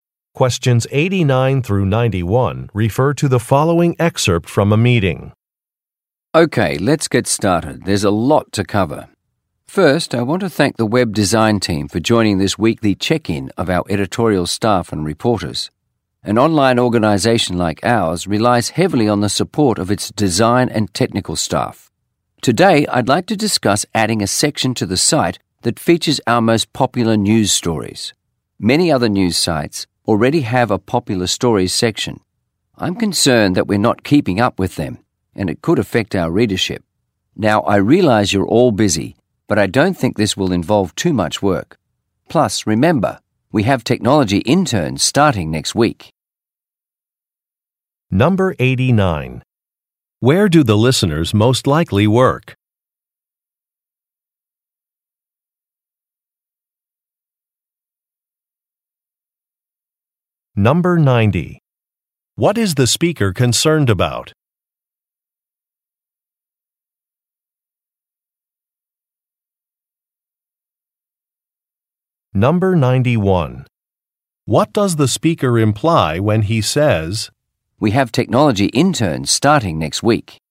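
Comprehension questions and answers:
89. Where do the listeners most likely work?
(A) At a software development company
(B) At a book publishing company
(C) At a graphic design firm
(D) At a news Web site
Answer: (D) At a news Web site

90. What is the speaker concerned about?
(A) Addressing a customer complaint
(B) Keeping up with competitors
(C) Exceeding an annual budget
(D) Improving employee productivity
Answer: (B) Keeping up with competitors

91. What does the speaker imply when he says, "we have technology interns starting next week"?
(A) A task must be finished soon.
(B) An assignment should be delayed.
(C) Volunteers are needed to greet interns.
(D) Interns can assist with a new project.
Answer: (D) Interns can assist with a new project.

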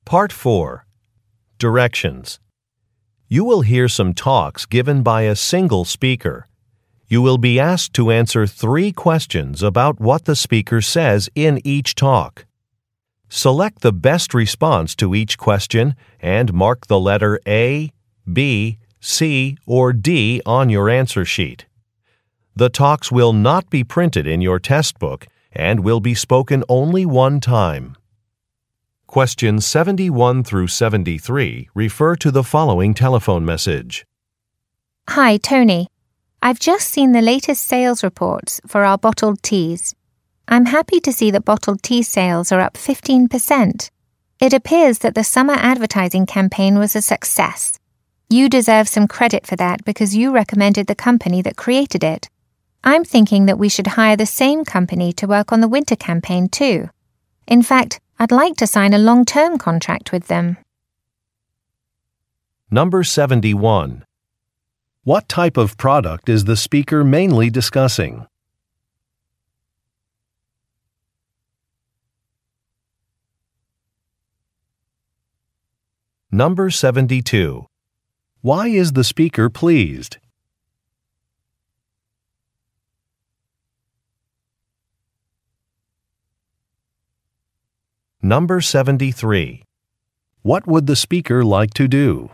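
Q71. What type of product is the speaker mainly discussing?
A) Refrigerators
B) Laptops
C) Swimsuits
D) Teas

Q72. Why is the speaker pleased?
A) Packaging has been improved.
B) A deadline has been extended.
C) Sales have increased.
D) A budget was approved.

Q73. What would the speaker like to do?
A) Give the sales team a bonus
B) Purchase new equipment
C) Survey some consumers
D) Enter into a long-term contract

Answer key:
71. D) Teas
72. C) Sales have increased.
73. D) Enter into a long-term contract

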